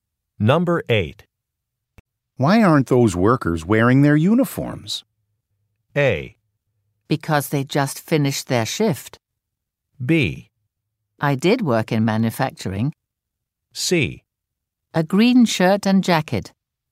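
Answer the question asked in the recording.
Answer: A: Because they just finished their shift.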